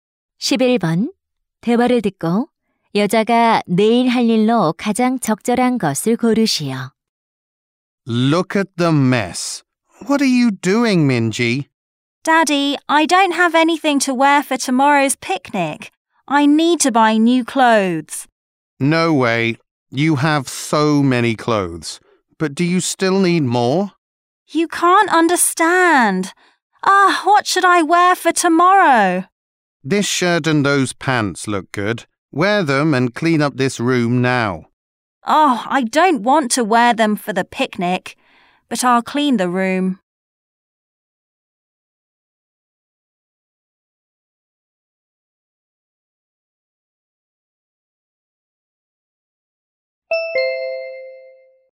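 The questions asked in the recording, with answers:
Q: 대화를 듣고 여자가 내일 할 일로 가장 적절한 것을 고르시오.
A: 소풍 가기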